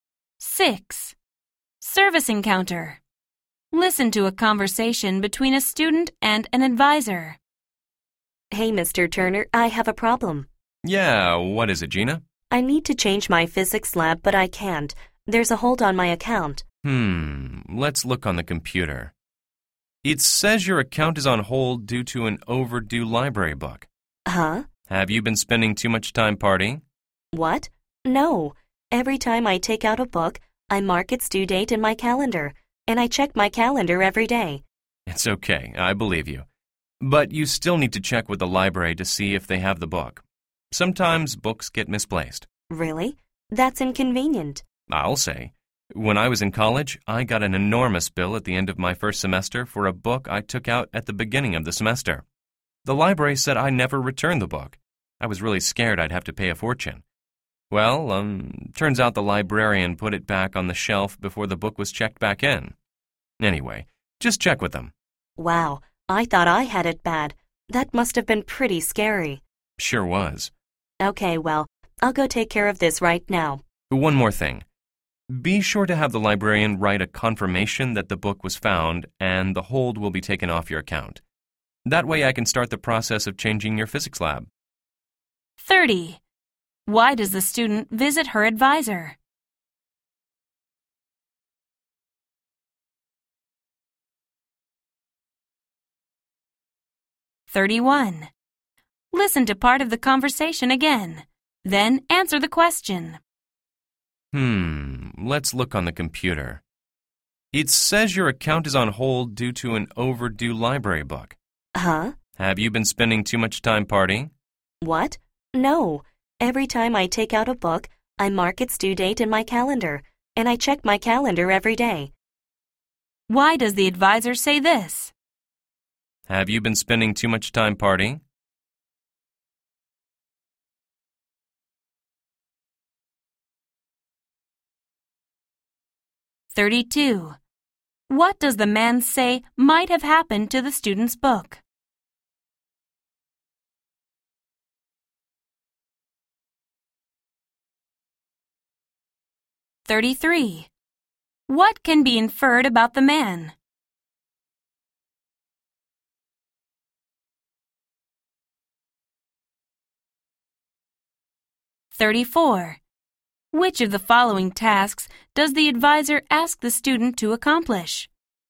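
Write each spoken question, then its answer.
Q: Why does the student visit her advisor?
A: She needs to change her physics lab but can't because of a hold on her account

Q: What does the man say might have happened to the student's book?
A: It might have been misplaced by the library

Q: Which of the following tasks does the advisor ask the student to accomplish?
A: Get the librarian to write a confirmation that the book was found and the hold will be removed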